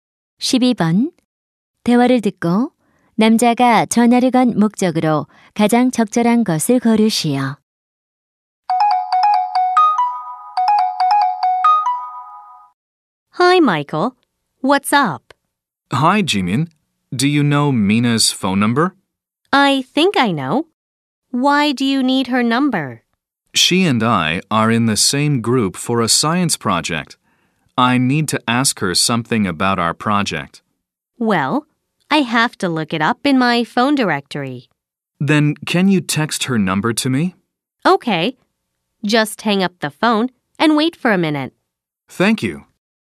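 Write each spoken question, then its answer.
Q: 대화를 듣고 남자가 전화를 건 목적으로 가장 적절한 것을 고르시오.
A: 미나의 전화번호를 물어보려고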